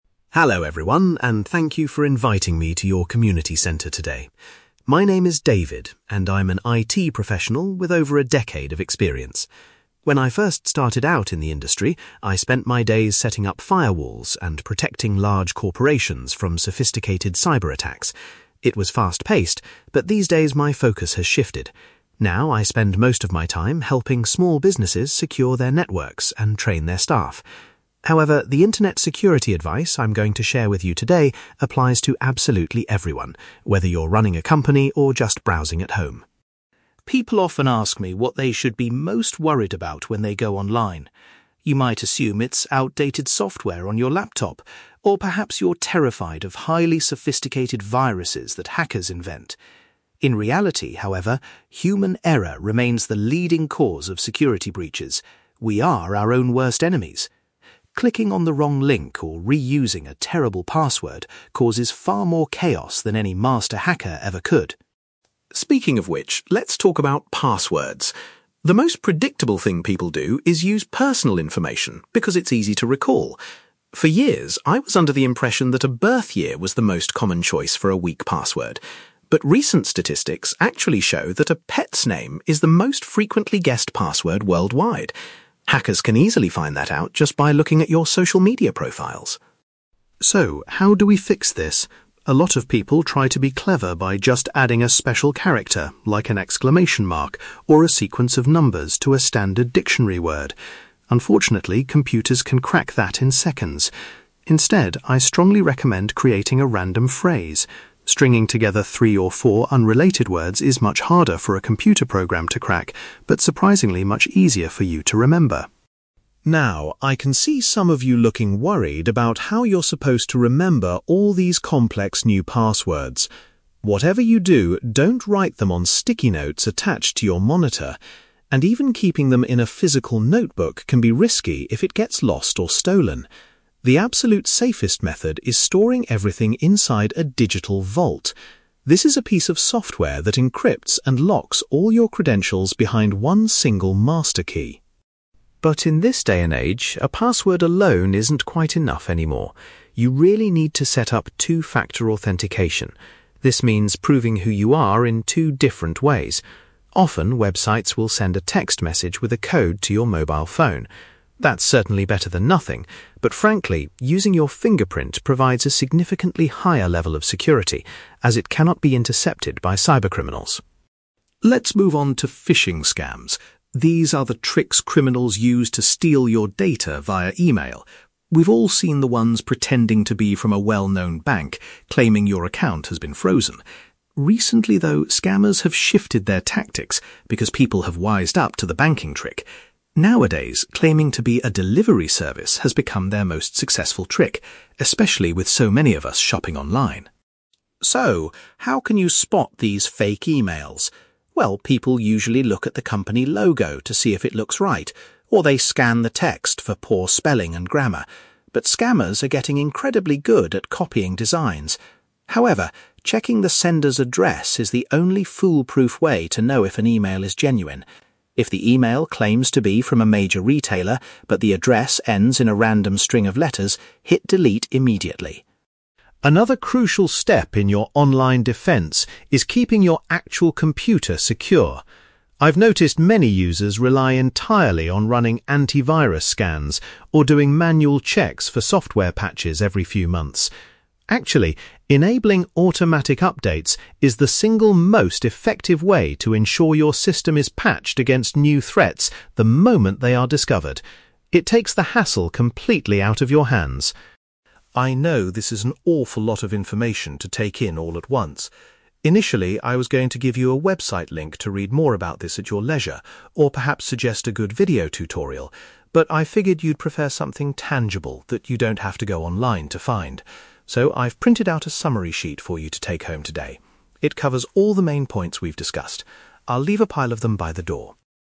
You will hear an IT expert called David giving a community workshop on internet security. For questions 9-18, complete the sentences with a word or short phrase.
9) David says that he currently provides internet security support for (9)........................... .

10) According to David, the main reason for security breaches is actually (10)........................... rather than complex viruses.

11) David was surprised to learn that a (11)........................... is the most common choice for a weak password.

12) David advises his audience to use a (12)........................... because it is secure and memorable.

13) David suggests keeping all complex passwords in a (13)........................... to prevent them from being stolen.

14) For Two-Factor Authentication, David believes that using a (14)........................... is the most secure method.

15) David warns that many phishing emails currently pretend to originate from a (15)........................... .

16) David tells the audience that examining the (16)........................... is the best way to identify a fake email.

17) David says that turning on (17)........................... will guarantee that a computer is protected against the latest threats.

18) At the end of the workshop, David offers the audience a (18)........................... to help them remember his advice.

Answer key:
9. small businesses
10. human error
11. pet's name
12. random phrase
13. digital vault
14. fingerprint
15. delivery service
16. sender's address
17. automatic updates
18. summary sheet

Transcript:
David: Hello, everyone, and thank you for inviting me to your community centre today. My name is David, and I'm an IT professional with over a decade of experience. When I first started out in the industry, I spent my days setting up firewalls and protecting large corporations from sophisticated cyber attacks. It was fast-paced, but these days my focus has shifted. Now, I spend most of my time helping small businesses secure their networks and train their staff. However, the internet security advice I'm going to share with you today applies to absolutely everyone, whether you're running a company or just browsing at home.
People often ask me what they should be most worried about when they go online. You might assume it's outdated software on your laptop, or perhaps you're terrified of highly sophisticated viruses that hackers invent. In reality, however, human error remains the leading cause of security breaches. We are our own worst enemies. Clicking on the wrong link or reusing a terrible password causes far more chaos than any master hacker ever could.
Speaking of which, let's talk about passwords. The most predictable thing people do is use personal information because it's easy to recall. For years, I was under the impression that a birth year was the most common choice for a weak password. But recent statistics actually show that a pet's name is the most frequently guessed password worldwide. Hackers can easily find that out just by looking at your social media profiles.
So, how do we fix this? A lot of people try to be clever by just adding a special character, like an exclamation mark, or a sequence of numbers to a standard dictionary word. Unfortunately, computers can crack that in seconds. Instead, I strongly recommend creating a random phrase; stringing together three or four unrelated words is much harder for a computer program to crack, but surprisingly much easier for you to remember.
Now, I can see some of you looking worried about how you're supposed to remember all these complex new passwords. Whatever you do, don't write them on sticky notes attached to your monitor! And even keeping them in a physical notebook can be risky if it gets lost or stolen. The absolute safest method is storing everything inside a digital vault. This is a piece of software that encrypts and locks all your credentials behind one single master key.
But in this day and age, a password alone isn't quite enough anymore. You really need to set up Two-Factor Authentication. This means proving who you are in two different ways. Often, websites will send a text message with a code to your mobile phone. That's certainly better than nothing, but frankly, using your fingerprint provides a significantly higher level of security, as it cannot be intercepted by cybercriminals.
Let's move on to phishing scams. These are the tricks criminals use to steal your data via email. We've all seen the ones pretending to be from a well-known bank, claiming your account has been frozen. Recently, though, scammers have shifted their tactics because people have wised up to the banking trick. Nowadays, claiming to be a delivery service has become their most successful trick, especially with so many of us shopping online.
So, how can you spot these fake emails? Well, people usually look at the company logo to see if it looks right, or they scan the text for poor spelling and grammar. But scammers are getting incredibly good at copying designs. However, checking the sender's address is the only foolproof way to know if an email is genuine. If the email claims to be from a major retailer but the address ends in a random string of letters, hit delete immediately.
Another crucial step in your online defence is keeping your actual computer secure. I've noticed many users rely entirely on running anti-virus scans or doing manual checks for software patches every few months. Actually, enabling automatic updates is the single most effective way to ensure your system is patched against new threats the moment they are discovered. It takes the hassle completely out of your hands.
I know this is an awful lot of information to take in all at once. Initially, I was going to give you a website link to read more about this at your leisure, or perhaps suggest a good video tutorial. But I figured you'd prefer something tangible that you don't have to go online to find. So, I've printed out a summary sheet for you to take home today. It covers all the main points we've discussed. I'll leave a pile of them by the door.

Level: B2